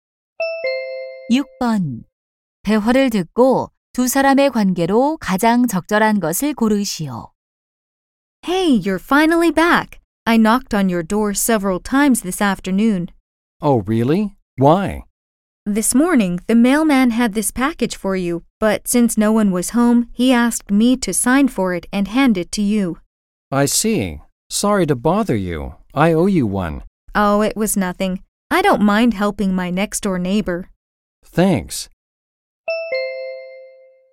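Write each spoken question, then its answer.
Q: 대화를 듣고 두 사람의 관계로 가장 적절한 것을 고르시오.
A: 이웃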